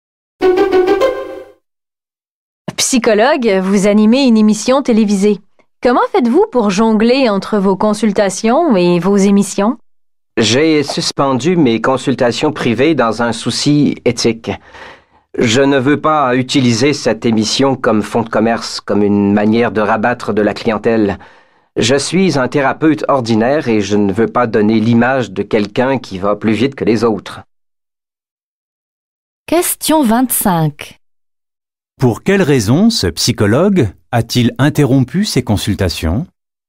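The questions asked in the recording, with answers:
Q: Pour quelle raison ce psychologue a-t-il interrompu ses consultations?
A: Pour une raison éthique : ne pas se servir de l'émission pour attirer des clients.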